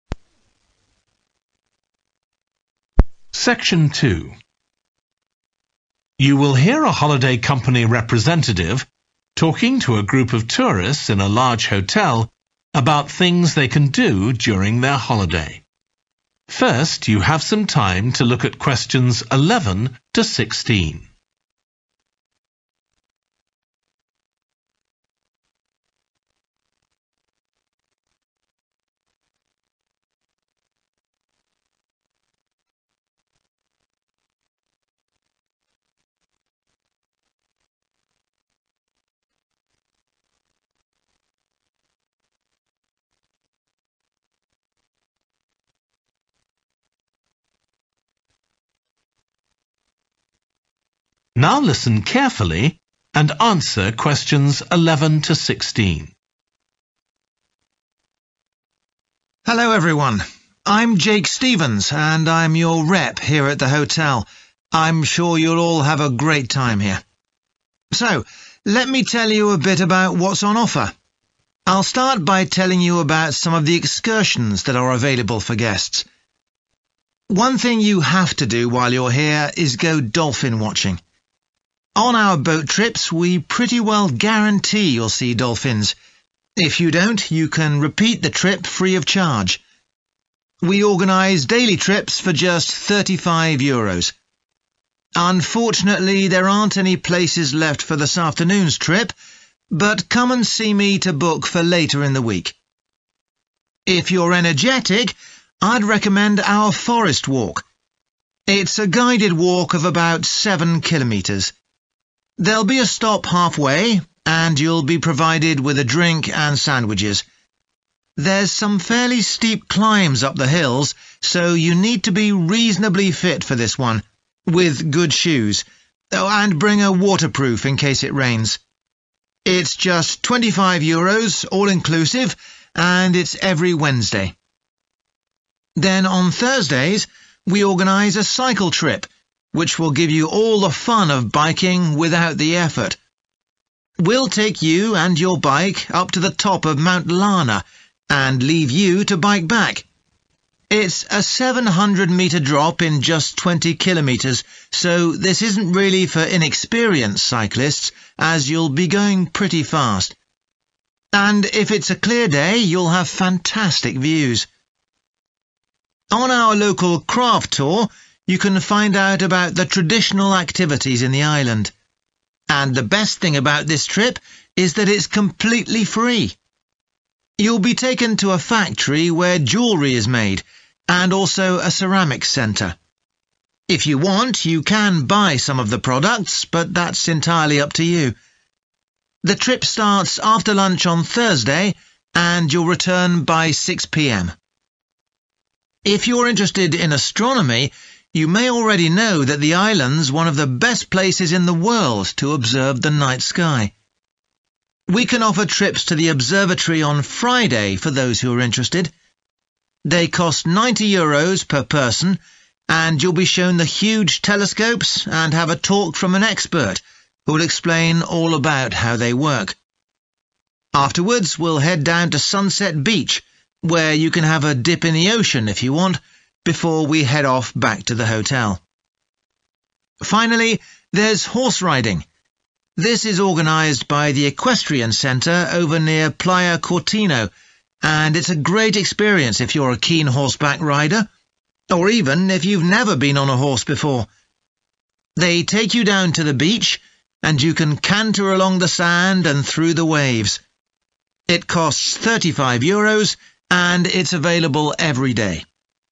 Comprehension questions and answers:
What information does the speaker give about each of the following excursions? Choose SIX answers from the box and match the correct letter, A-H, with Questions 11-16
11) dolphin watching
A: G. fully booked today

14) local craft tour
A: E. no charge

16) horse riding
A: B. suitable for beginners

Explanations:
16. it's a great experience if you're a keen horseback rider, or even if you've never been on a horse before (= suitable for beginners) [đó là một trải nghiệm tuyệt vời nếu bạn là một người thích cưỡi ngựa, ngay cả khi bạn chưa bao giờ cưỡi ngựa trước đây]

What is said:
Hello everyone. I'm Jake Stevens and I'm your rep here at the hotel. I'm sure you'll all have a great time here. So let me tell you a bit about what's on offer. I'll start by telling you about some of the excursions that are available for guests.
One thing you have to do while you're here is go dolphin watching. On our boat trips, we pretty well guarantee you'll see dolphins – if you don't you can repeat the trip free of charge. We organise daily trips for just 35 euros. (Q11) Unfortunately there aren't any places left for this afternoon's trip (= fully booked today) [Rất tiếc, không còn chỗ cho chuyến đi chiều nay], but come and see me to book for later in the week.
If you're energetic, I'd recommend our forest walk. It's a guided walk of about seven kilometres. There's some fairly steep climbs up the hills, so you need to be reasonably fit for this one, with good shoes, and bring a waterproof in case it rains. It's just 25 euros all inclusive, and it's every Wednesday.
Then on Thursdays we organise a cycle trip, which will give you all the fun of biking without the effort. We'll take you and your bike up to the top of Mount Larna, and leave you to bike back – (Q13) it's a 700-metre drop in just 20 kilometres (= all downhill) [nó giảm 700 mét độ cao chỉ trong quãng đường dài 20 km] so this isn't really for inexperienced cyclists as you'll be going pretty fast. And if it's a clear day, you'll have fantastic views.
On our local craft tour you can find out about the traditional activities in the island. You'll be taken to a factory where jewellery is made, and also a ceramics centre. If you want, you can buy some of the products but that's entirely up to you. The trip starts after lunch on Thursday, and you'll return by 6 pm.
If you're interested in astronomy you may already know that the island's one of the best places in the world to observe the night sky. We can offer trips to the observatory on Friday for those who are interested. They cost 90 euros per person and you'll be shown the huge telescopes and have a talk from an expert, who'll explain all about how they work.